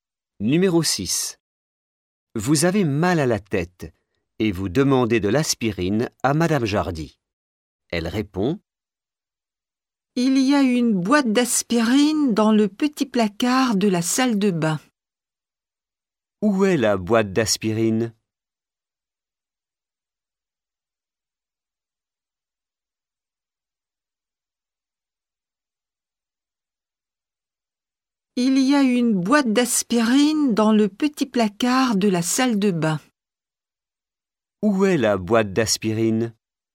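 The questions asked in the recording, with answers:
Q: Où est la boîte d'aspirine ?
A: Dans le petit placard de la salle de bain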